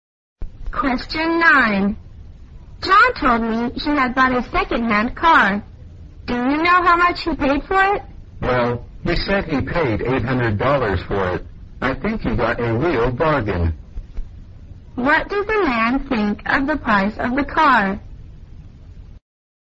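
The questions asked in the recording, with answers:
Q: What does the man think of the price of the car?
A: It was a real bargain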